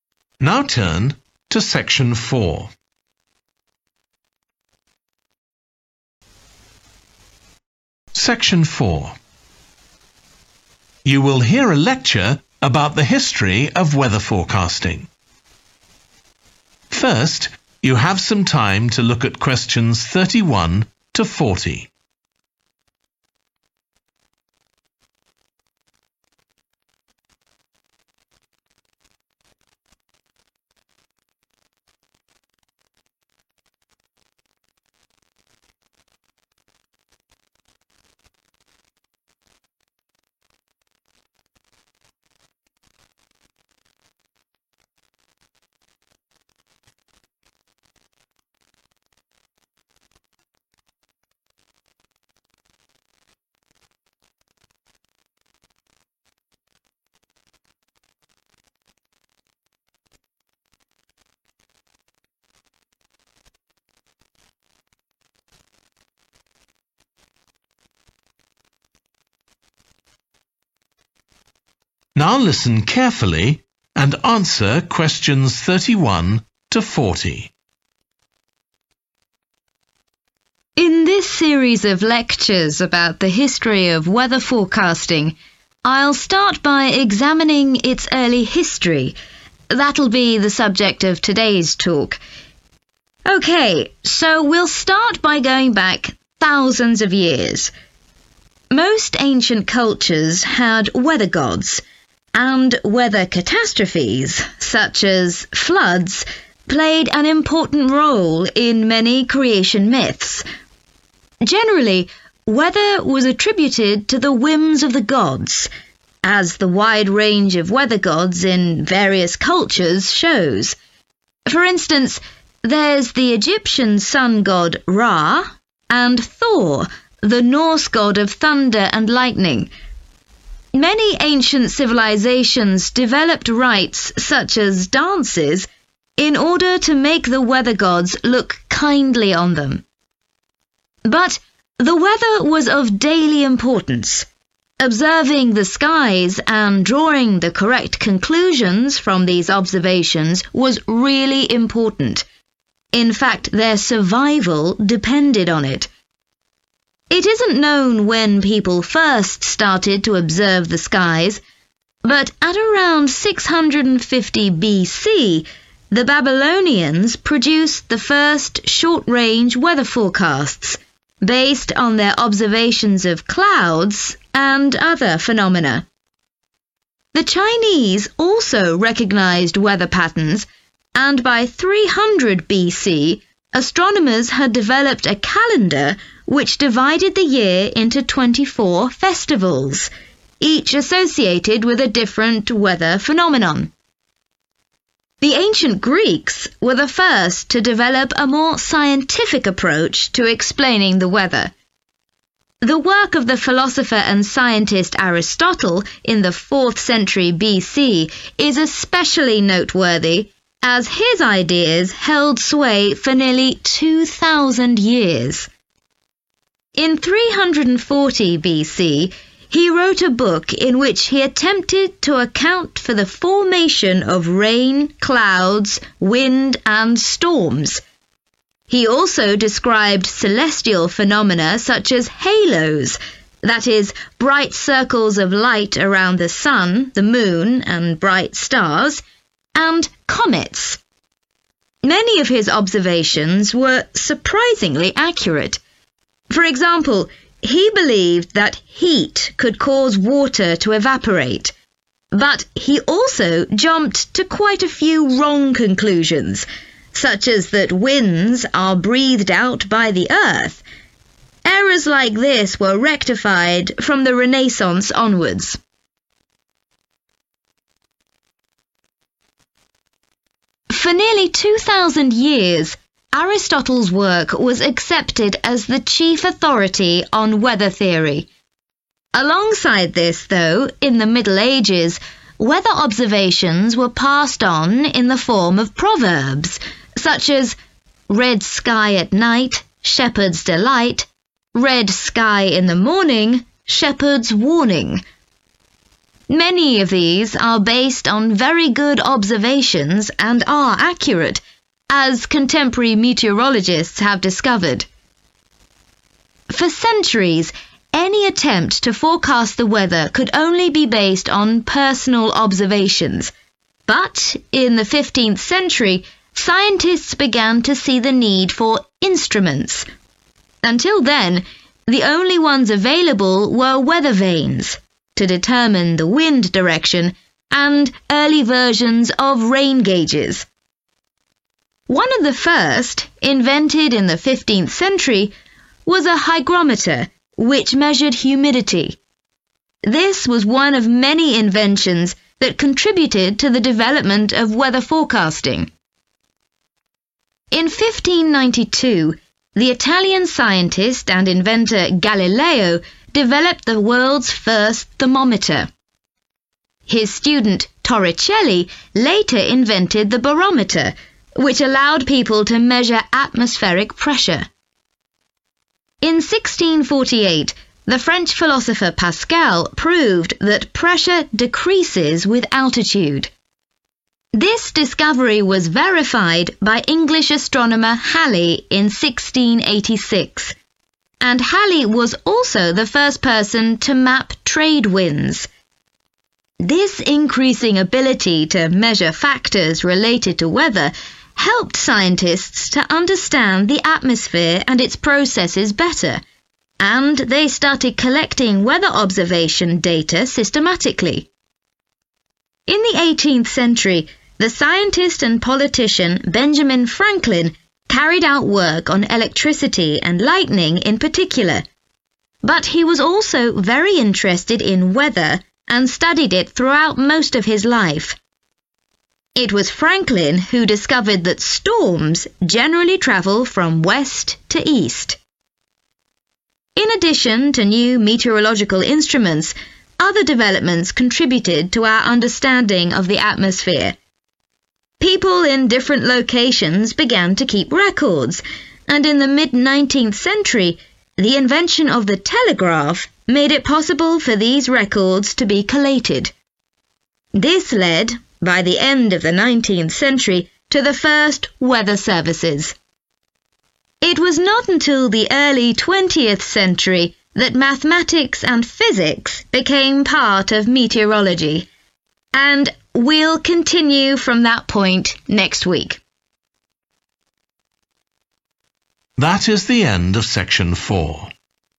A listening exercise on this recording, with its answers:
Complete the notes below. Write ONE WORD ONLY for each answer.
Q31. many cultures invented 31. and other ceremonies to make the weather gods friendly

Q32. people needed to observe and interpret the sky to ensure their 32.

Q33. around 650 BC, Babylonians started forecasting, using weather phenomena such as 33.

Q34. by 300 BC, the Chinese had a calendar made up of a number of 34. connected with the weather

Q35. Aristotle also described haloes and 35.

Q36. many proverbs, e.g. about the significance of the colour of the 36. , passed on accurate information.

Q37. 15th century: scientists recognised value of 37. for the first time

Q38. Galileo invented the 38.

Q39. 18th century: Franklin identified the movement of 39.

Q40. 19th century: data from different locations could be sent to the same place by 40.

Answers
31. dances
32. survival
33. clouds
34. festivals
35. comets
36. sky
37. instruments
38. thermometer
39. storms
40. telegraph